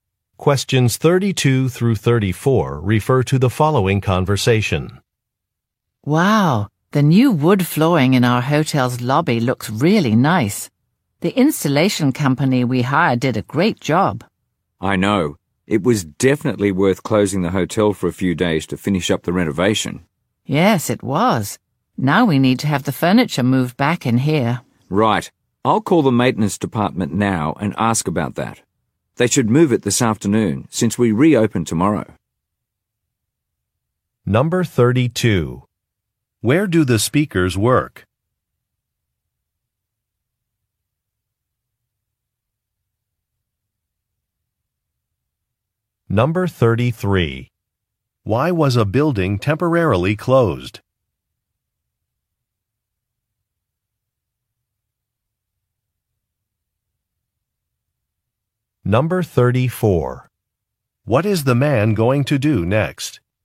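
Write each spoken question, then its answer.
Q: Where do the speakers work?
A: At a hotel

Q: Why was a building temporarily closed?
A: For a renovation (new wood flooring installed)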